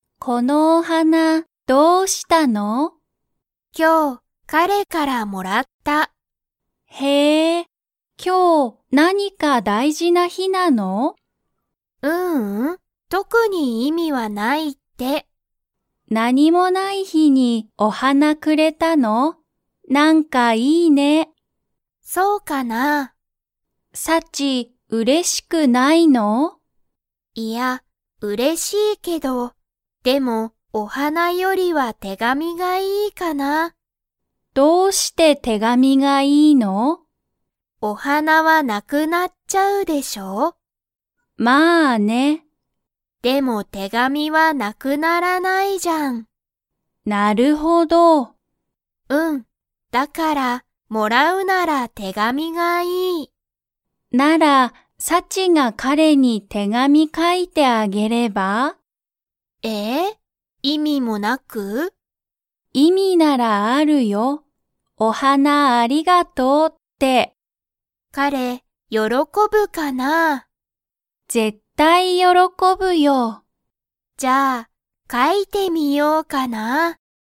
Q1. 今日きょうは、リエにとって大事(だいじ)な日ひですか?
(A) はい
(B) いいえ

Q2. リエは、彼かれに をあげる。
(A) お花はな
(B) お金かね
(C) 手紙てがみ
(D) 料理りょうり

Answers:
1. B
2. C

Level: Level 3

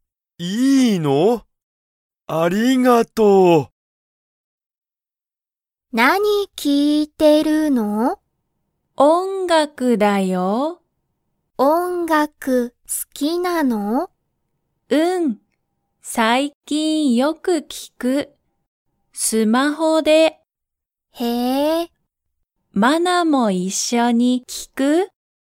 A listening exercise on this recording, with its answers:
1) ミキは音楽(おんがく)が好(す)きですか?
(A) はい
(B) いいえ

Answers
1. A

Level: Level 1

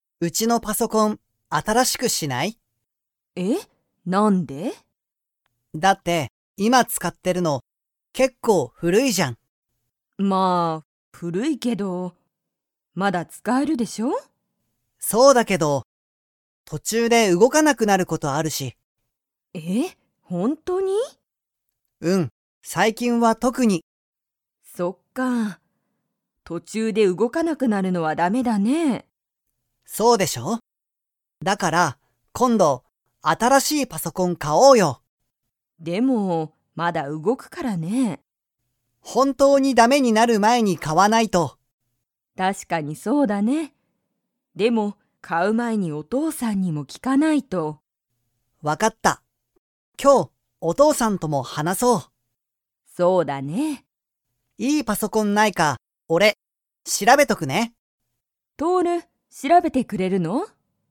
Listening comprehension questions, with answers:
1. とおるのうちのパソコンは、 。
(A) 古ふるい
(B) 古ふるくない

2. パソコンを買かう前まえに、誰だれに聞ききますか?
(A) お母かあさん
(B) お父とうさん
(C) とおる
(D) とおるの友達ともだち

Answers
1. A
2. B

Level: Level 3

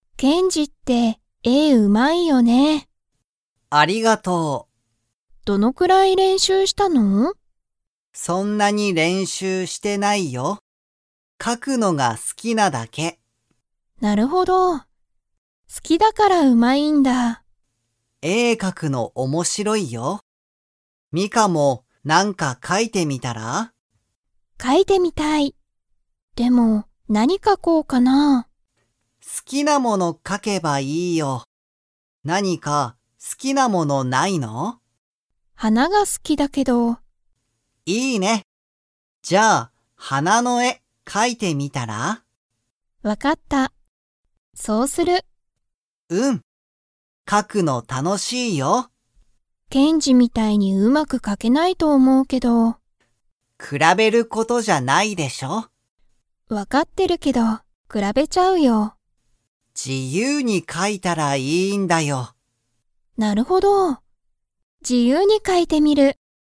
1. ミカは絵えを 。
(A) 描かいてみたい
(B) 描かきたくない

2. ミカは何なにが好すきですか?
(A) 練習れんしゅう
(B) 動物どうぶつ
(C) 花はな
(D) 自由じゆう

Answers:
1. A
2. C

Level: Level 3

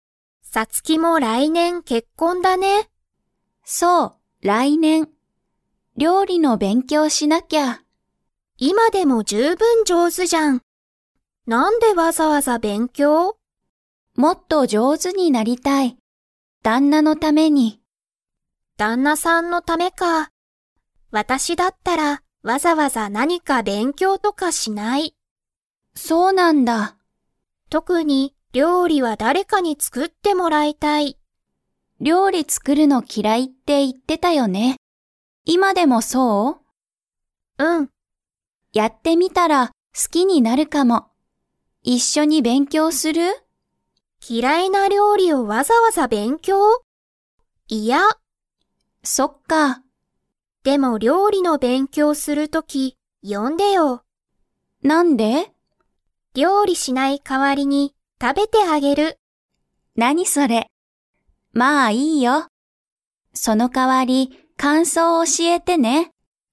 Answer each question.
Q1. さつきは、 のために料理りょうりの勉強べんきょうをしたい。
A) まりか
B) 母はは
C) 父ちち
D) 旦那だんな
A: D

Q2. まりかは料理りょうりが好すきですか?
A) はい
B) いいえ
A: B

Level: Level 4

